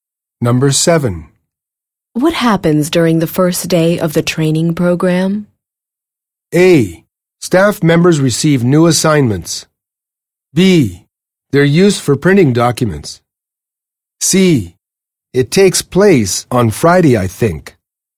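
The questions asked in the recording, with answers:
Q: What happens during the first day of the training program?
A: A: Staff members receive new assignments.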